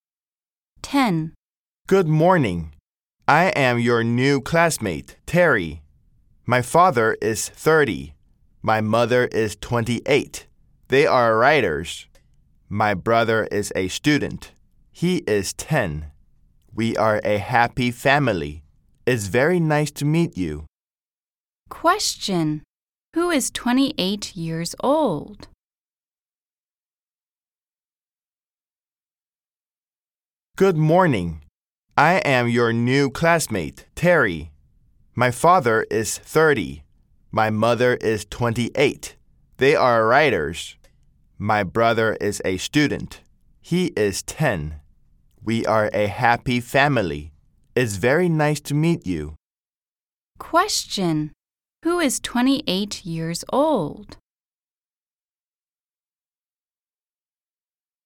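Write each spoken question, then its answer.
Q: Question. Who is 28 years old?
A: Terry's mother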